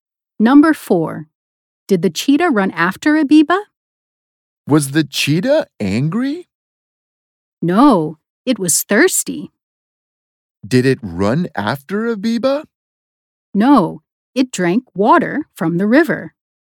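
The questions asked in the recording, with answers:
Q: Did the cheetah run after Abiba?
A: No, it drank water from the river.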